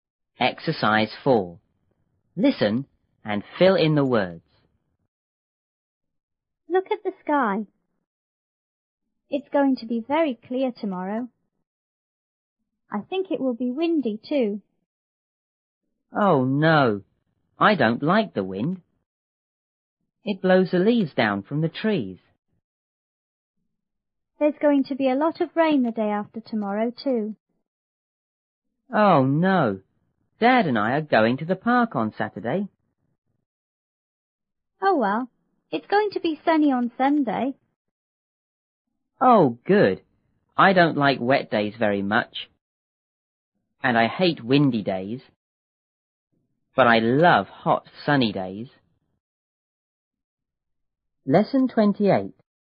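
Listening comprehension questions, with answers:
4.Listen and fill in the words.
A:Look at the ______.It's going to be very ______ tomorrow.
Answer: sky; clear

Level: 六年级下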